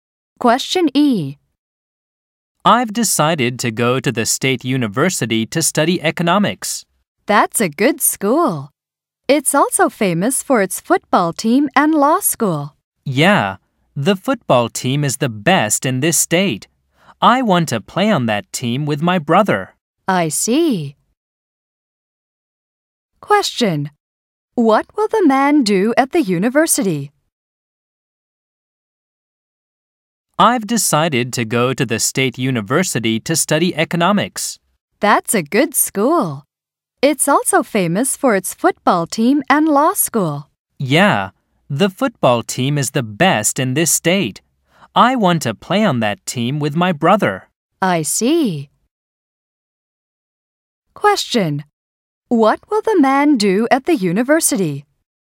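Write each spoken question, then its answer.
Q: What will the man do at the university?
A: Study economics and play on the football team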